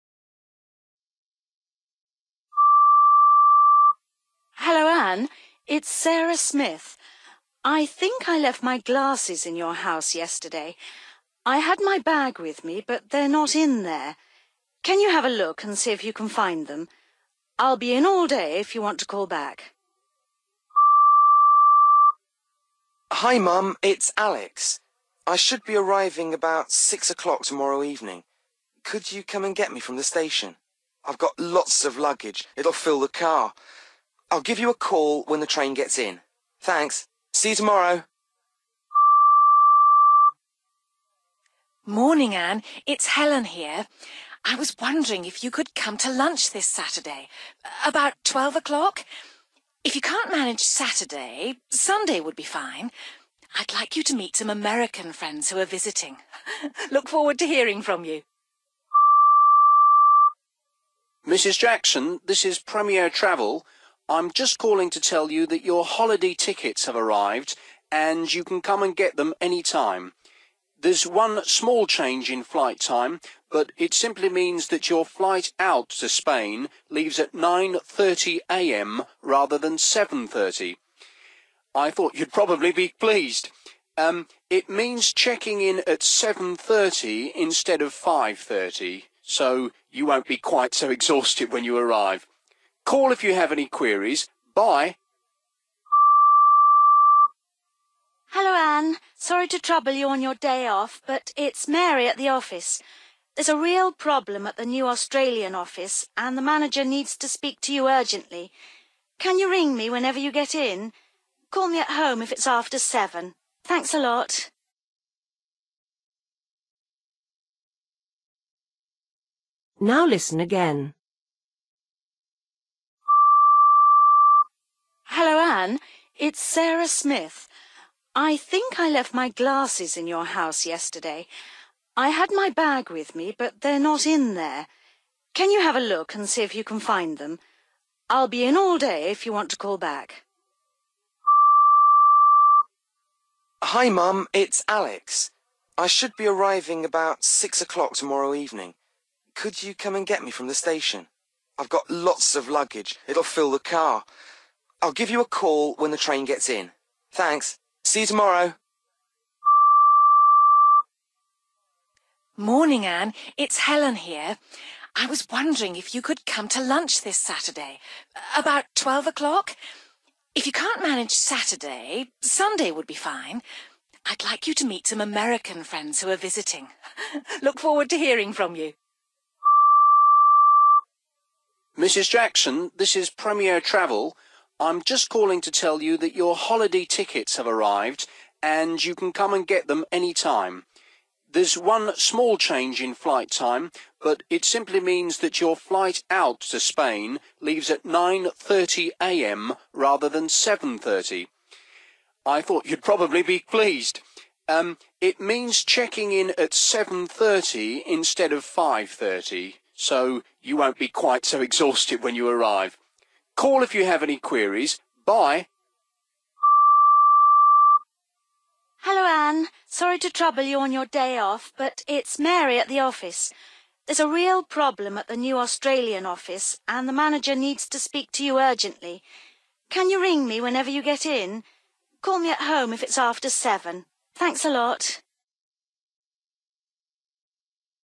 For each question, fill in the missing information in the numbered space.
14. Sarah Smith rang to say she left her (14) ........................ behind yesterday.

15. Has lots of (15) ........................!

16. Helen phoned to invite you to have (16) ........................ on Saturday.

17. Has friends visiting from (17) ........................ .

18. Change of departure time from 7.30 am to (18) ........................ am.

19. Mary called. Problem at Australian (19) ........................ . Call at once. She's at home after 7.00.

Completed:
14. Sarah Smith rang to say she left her glasses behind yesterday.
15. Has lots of luggage / cases / bags!
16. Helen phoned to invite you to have (a) lunch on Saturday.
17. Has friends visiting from America / American (friends) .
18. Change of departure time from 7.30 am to 9.30 (am) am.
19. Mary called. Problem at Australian (new) office(s) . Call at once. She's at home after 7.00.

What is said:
it's Sarah Smith. I think I left my glasses in your house yesterday. I had my bag with me but they're not in there. Can you have a look and see if you can find them? I'll be in all day if you want to call back.
Hi Mum, it's Alex. I should be arriving about 6 o'clock tomorrow evening. Could you come and get me from the station? I've got lots of luggage, it'll fill the car! I'll give you a call when the train gets in. Thanks ... see you tomorrow.
Morning Ann, it's Helen here. I was wondering if you could come to lunch this Saturday? About 12 o'clock. If you can't mange Saturday, Sunday would be fine. I'd like you to meet some American friends who are visiting. Look forward to hearing from you.
Mrs Jackson, this is Premier Travel. I'm just calling to tell you that your holiday tickets have arrived and you can come and get them any time. There's one small change in flight time, but it simply means that your flight out to Spain leaves at 9.30 am rather than 7.30. I thought you'd probably be pleased! It means checking in at 7.30 instead of 5.30, so you won't be quite so exhausted when you arrive. Call if you have any queries. Bye.
Hello Ann, sorry to trouble you on your day off, but it's Mary at the office. There's a real problem at the new Australian office and the manager needs to speak to you urgently. Can you ring me whenever you get in – call me at home if it's after 7.00. Thanks a lot.

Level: B1